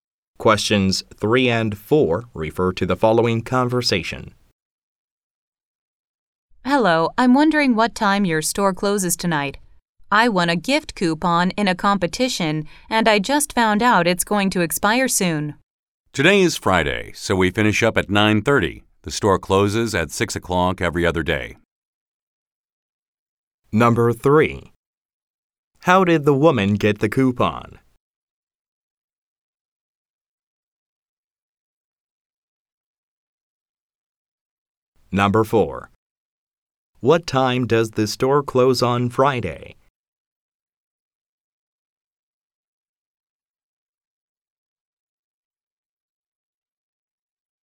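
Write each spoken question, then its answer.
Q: How did the woman get the coupon?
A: She won it in a competition.

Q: What time does the store close on Friday?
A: 9:30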